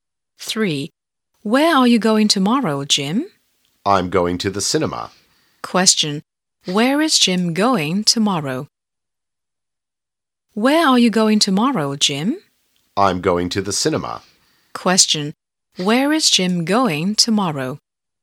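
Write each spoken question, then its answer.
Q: Where is Jim going tomorrow?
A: To the cinema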